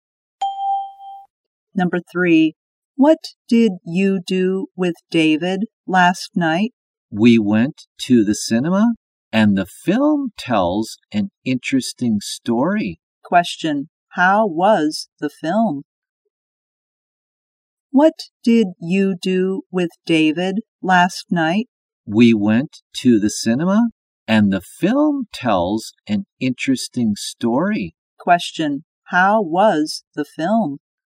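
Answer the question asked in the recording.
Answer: Interesting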